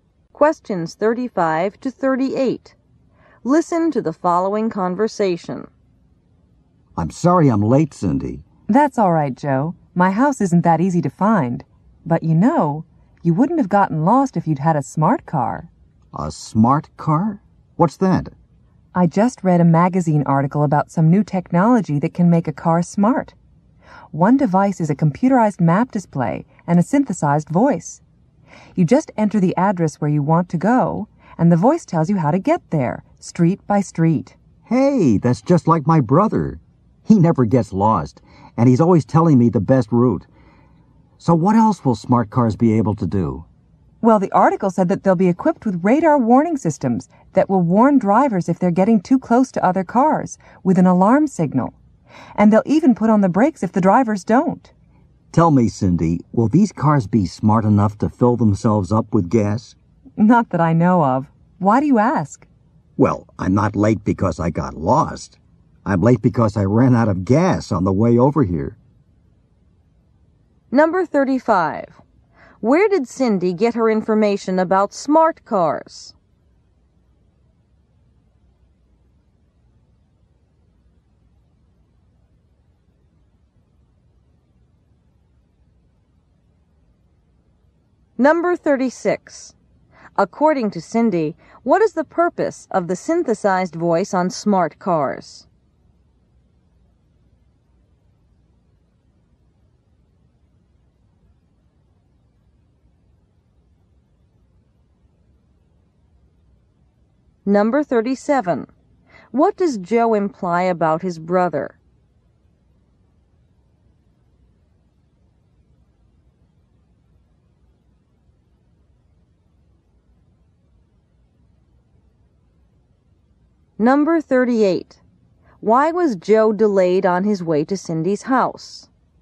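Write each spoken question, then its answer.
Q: Where did Cindy get her information about smart cars?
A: From a magazine article

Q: According to Cindy, what is the purpose of the synthesized voice on smart cars?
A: To give directions street by street

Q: What does Joe imply about his brother?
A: He always knows the best route and never gets lost

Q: Why was Joe delayed on his way to Cindy's house?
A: He ran out of gas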